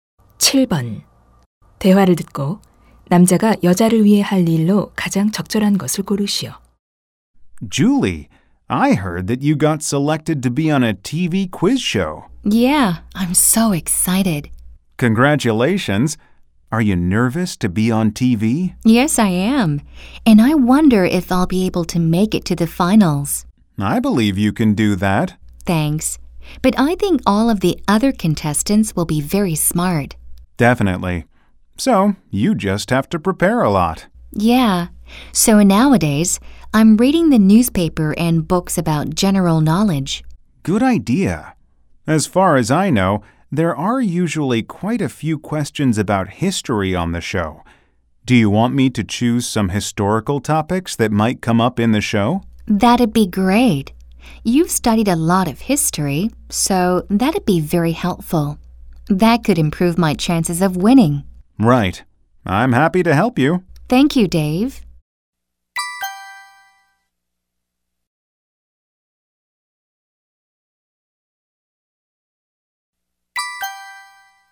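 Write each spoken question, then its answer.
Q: 대화를 듣고 남자가 여자를 위해 할 일로 가장 적절한 것을 고르시오.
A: 퀴즈 쇼에 나올 만한 역사 주제 골라 주기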